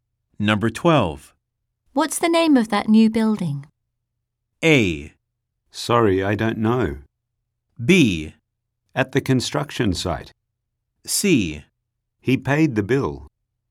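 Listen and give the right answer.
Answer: A: Sorry, I don't know.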